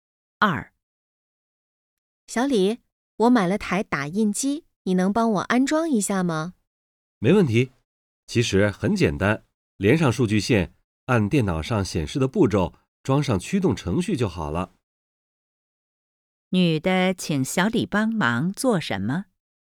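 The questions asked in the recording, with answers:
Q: 女的请小李帮忙做什么?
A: 安装打印机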